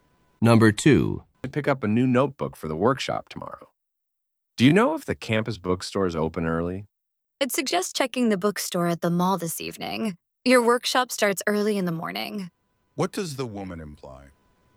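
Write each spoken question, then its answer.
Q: What does the woman imply?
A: The campus bookstore may not open early enough, so he should buy the notebook at the mall bookstore this evening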